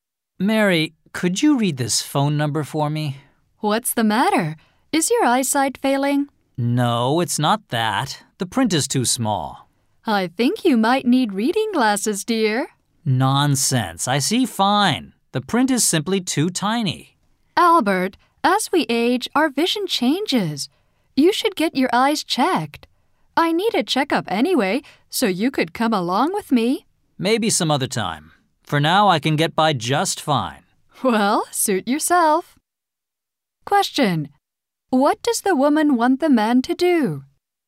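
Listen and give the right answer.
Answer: Get his eyes checked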